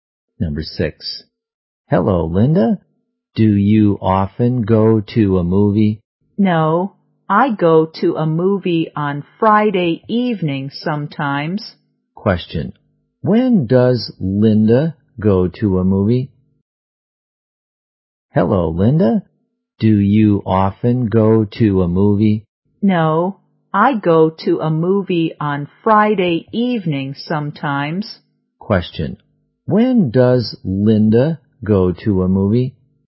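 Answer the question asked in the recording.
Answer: Sometimes on Friday evening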